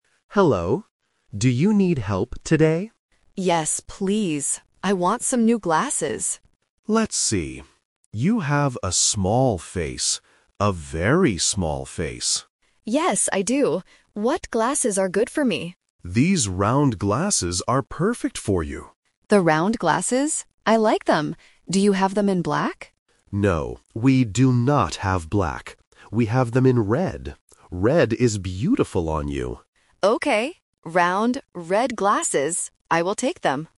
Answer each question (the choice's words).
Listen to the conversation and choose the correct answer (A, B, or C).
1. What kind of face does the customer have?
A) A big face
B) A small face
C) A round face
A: A small face

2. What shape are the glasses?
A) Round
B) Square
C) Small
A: Round

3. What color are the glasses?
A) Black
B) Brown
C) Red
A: Red

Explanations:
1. The shop assistant says, "You have a small face. A very small face." Why the trap is wrong: Option (C) A round face is a trap because the word "round" is mentioned in the audio, but it describes the glasses, not her face. Option (A) A big face is the opposite of the truth.
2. The shop assistant suggests, "These round glasses are perfect for you." Why the trap is wrong: Option (C) Small is a trap because "small" is used to describe the customer's face, not the shape of the glasses. Option (B) Square is a common shape for glasses but is not mentioned.
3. The assistant says, "We have them in red," and the customer agrees to buy "Round, red glasses." Why the trap is wrong: Option (A) Black is a trap. The customer asks, "Do you have them in black?", but the assistant says "No". Option (B) Brown is not mentioned at all.